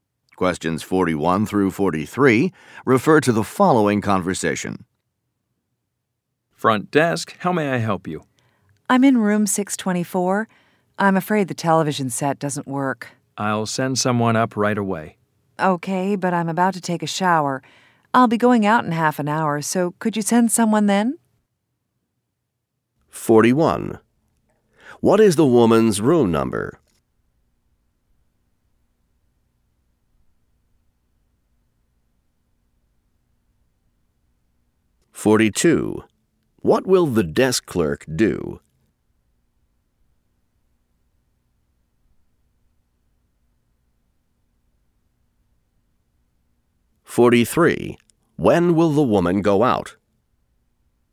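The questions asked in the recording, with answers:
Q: What is the woman's room number?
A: 624

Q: What will the desk clerk do?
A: Send someone up to fix the television

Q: When will the woman go out?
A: In half an hour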